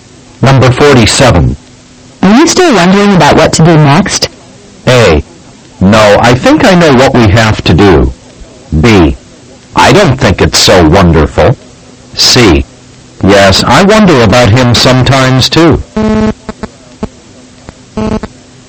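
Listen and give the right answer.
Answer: A: No, I think I know what we have to do.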